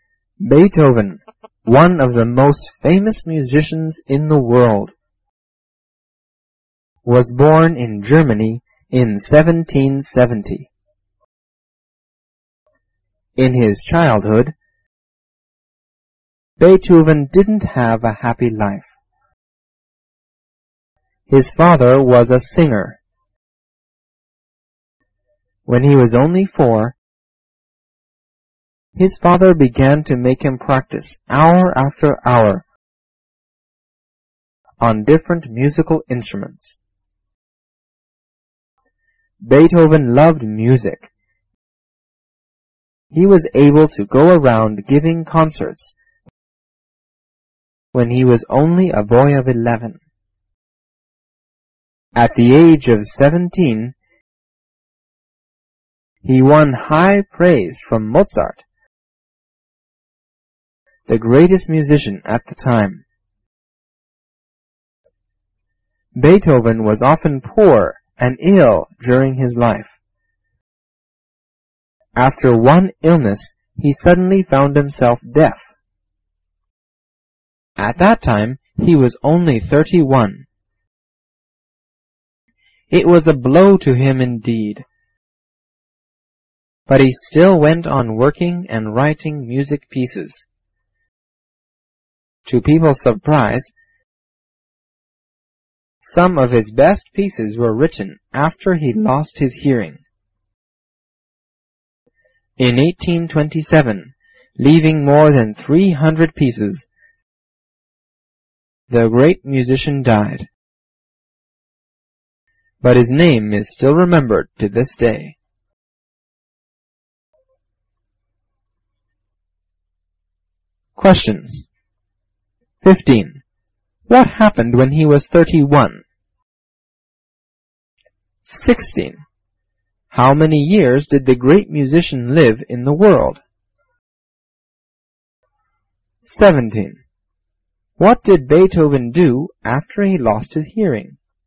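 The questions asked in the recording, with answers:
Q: What happened when he was 31?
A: He became deaf

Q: How many years did the great musician live in the world?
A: 57 years

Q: What did Beethoven do after he lost his hearing?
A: He went on working and writing music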